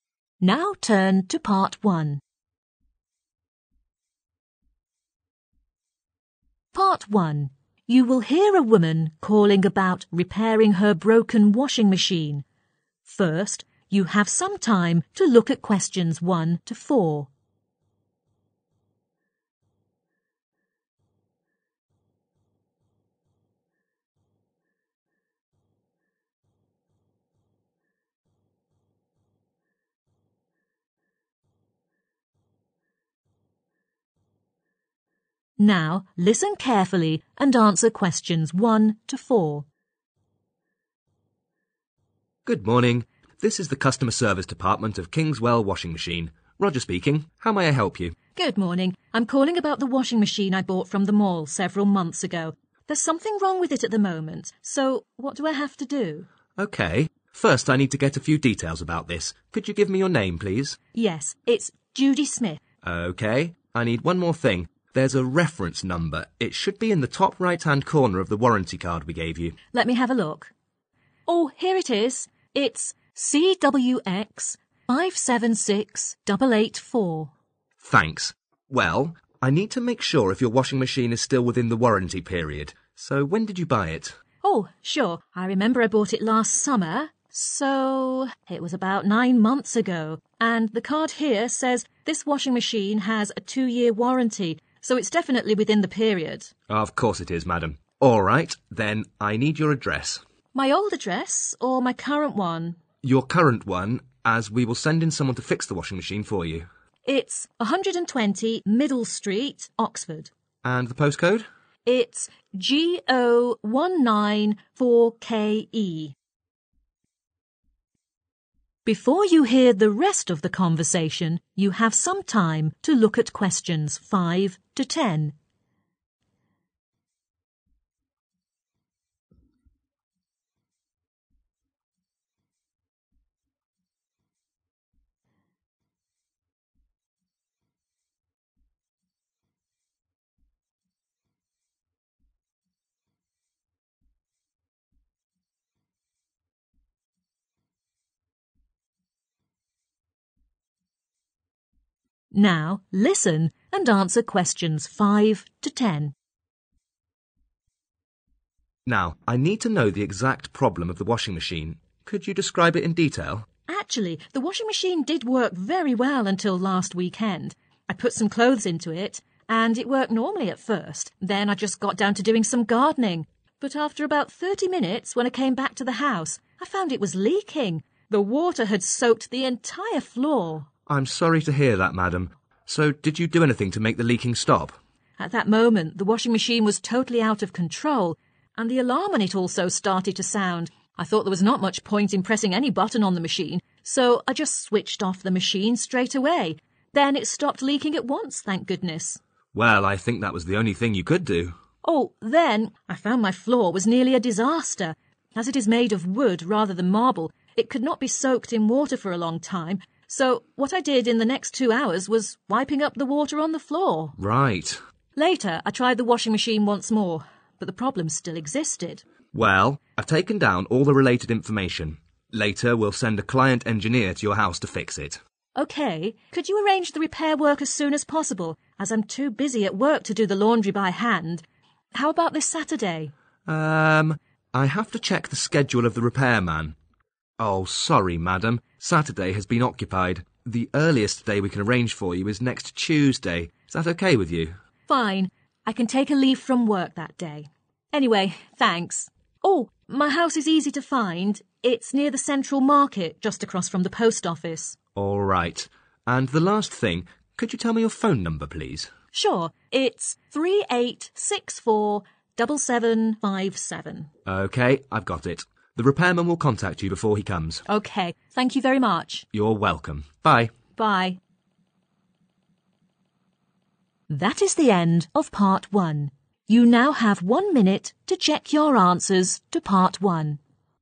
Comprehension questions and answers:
Complete the table below. Write ONE MORE THAN TWO WORDS AND OR A NUMBER for each answer.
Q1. • Reference number: 1 .............. .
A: CWX576884

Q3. • Current address 120 3 ............... , Oxford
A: Middle Street

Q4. • Postcode: 4 .............. .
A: Go194KE

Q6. • The washing machine was out of control and the woman 6 ...... immediately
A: Switched off

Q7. • The floor is made of 7 .......... .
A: wood

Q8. • Ask a 8 ........ to repair the washing machine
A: Client engineer

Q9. • The repairman is available 9 .............. .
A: next Tuesday

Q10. • The woman's house is oppsite the 10 ............ .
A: Post Office